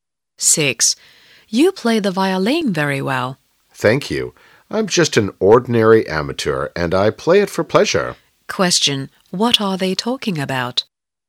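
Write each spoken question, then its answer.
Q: What are they talking about?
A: Playing the violin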